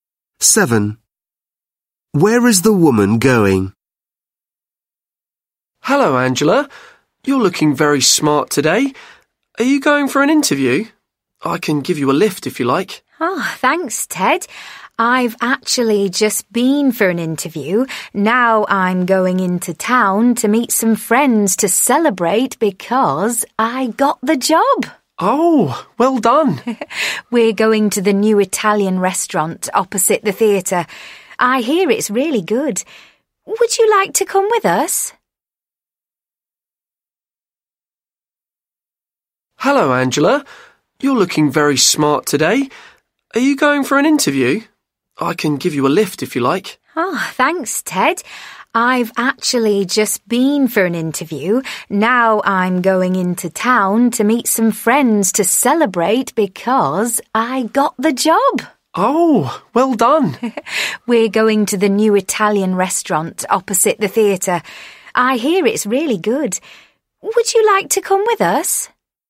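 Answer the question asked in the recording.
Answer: To the new Italian restaurant opposite the theatre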